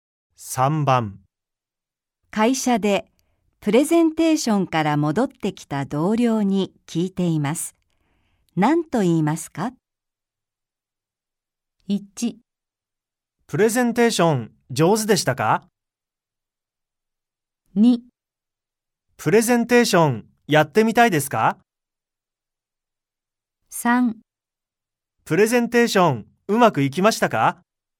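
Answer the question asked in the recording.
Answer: 3: プレゼンテーションうまくいきましたか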